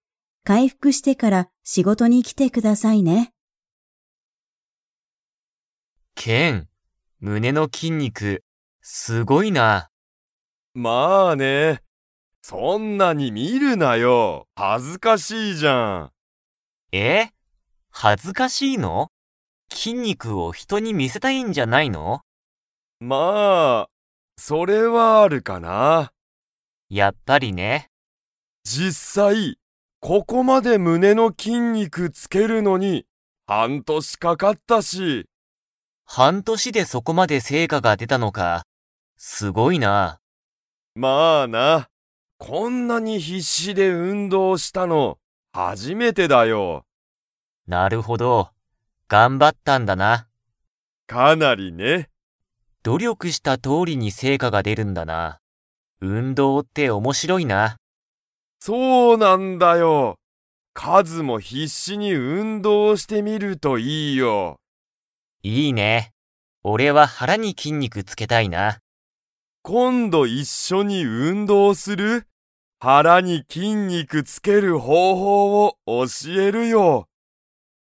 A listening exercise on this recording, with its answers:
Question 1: ケンがここまで胸むねの筋肉きんにくをつけるのに、どのくらいかかりましたか?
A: 半年はんとし

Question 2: カズは胸むねに筋肉きんにくをつけたいですか?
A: いいえ

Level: Level 4